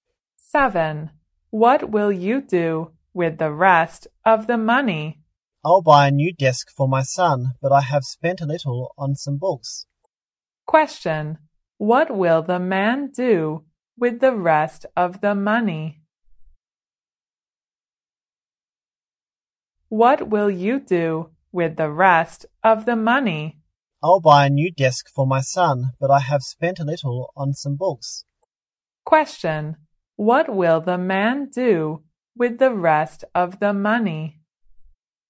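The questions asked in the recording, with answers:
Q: What will the man do with the rest of the money?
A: Buy a new desk for his son.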